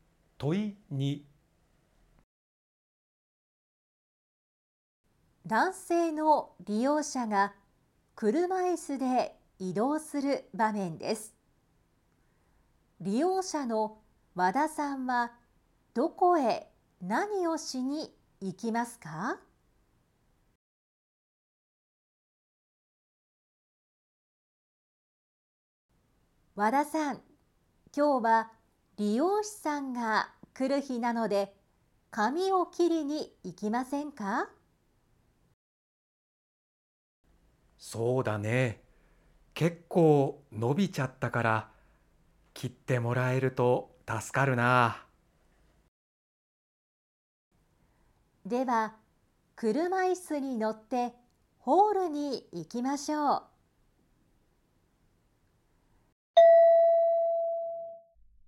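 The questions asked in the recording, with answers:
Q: 利用者の和田さんはどこへ何をしに行きますか?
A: ホールへ髪を切りに行く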